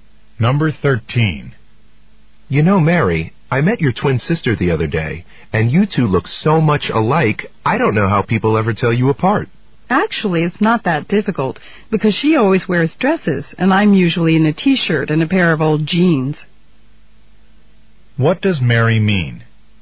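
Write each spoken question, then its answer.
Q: What does Mary mean?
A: People can tell them apart by their clothes.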